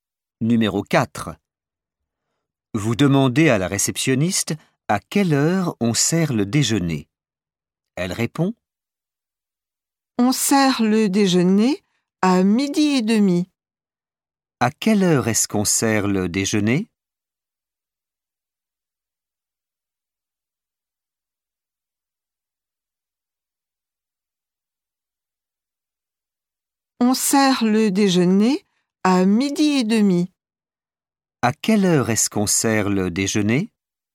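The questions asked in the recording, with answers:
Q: À quelle heure est-ce qu'on sert le déjeuner?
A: à 12h30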